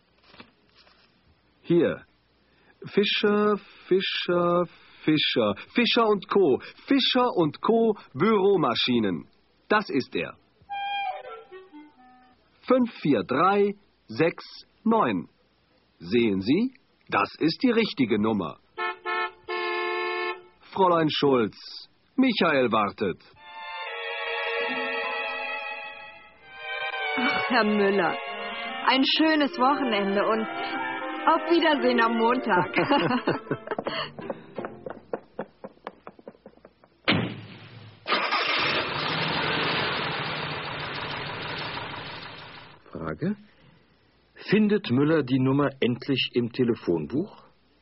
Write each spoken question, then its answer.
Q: Findet Müller die Nummer endlich im Telefonbuch?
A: Ja, er findet sie endlich.